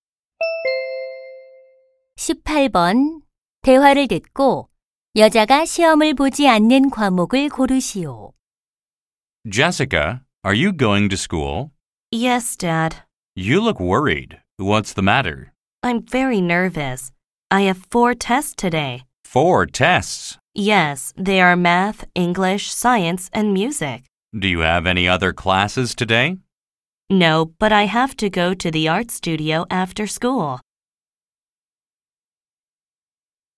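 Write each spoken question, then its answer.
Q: 대화를 듣고 여자가 시험을 보지 않는 과목을 고르시오.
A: 미술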